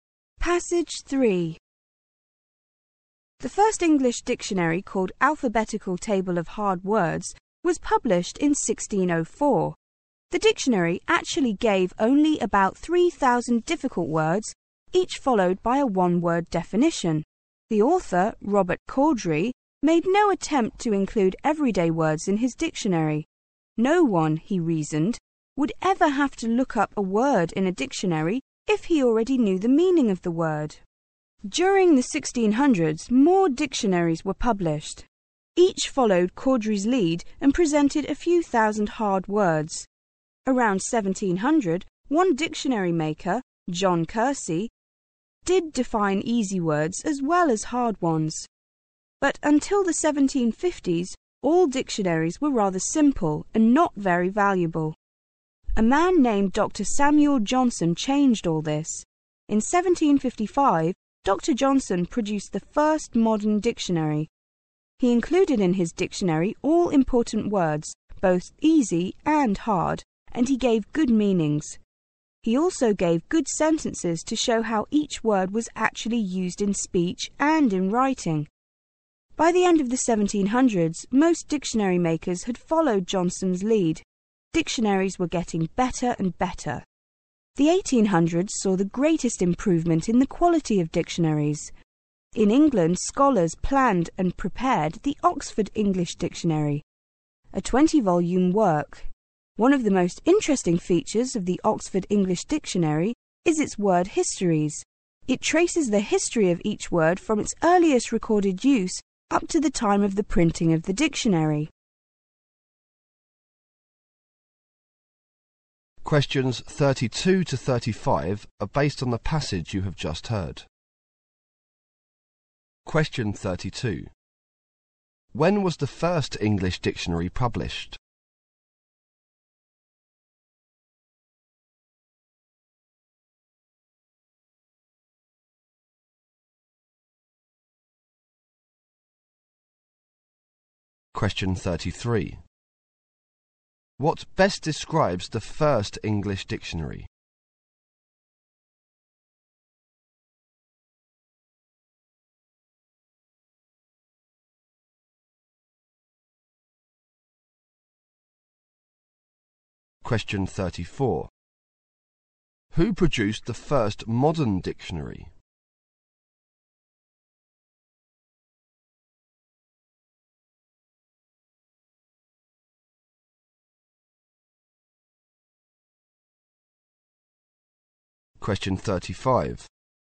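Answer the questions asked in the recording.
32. In 1604
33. It listed about 3,000 hard words, each with a one-word definition.
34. Dr. Samuel Johnson
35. Its word histories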